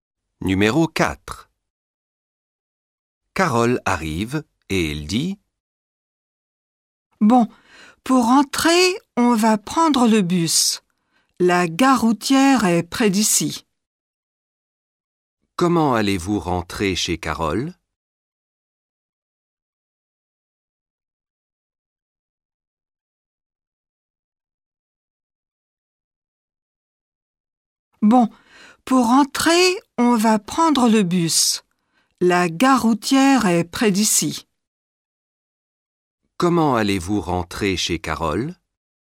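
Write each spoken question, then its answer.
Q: Comment allez-vous rentrer chez Carole?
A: en bus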